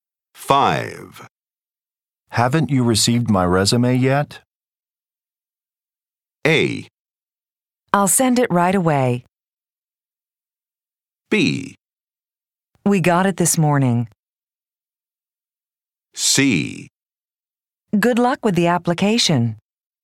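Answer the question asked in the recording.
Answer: B: We got it this morning.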